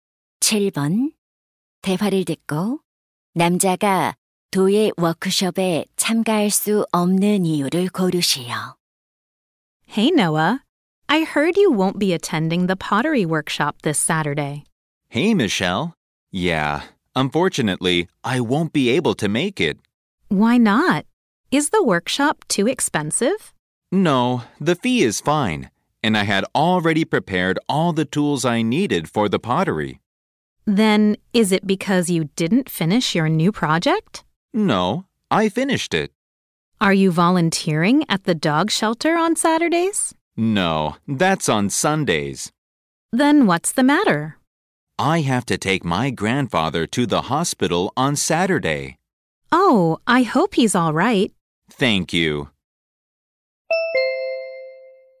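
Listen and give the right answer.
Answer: 할아버지를 병원에 모셔다 드려야 해서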